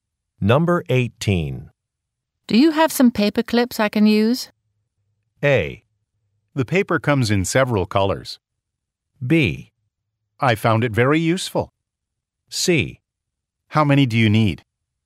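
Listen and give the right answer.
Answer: C: How many do you need?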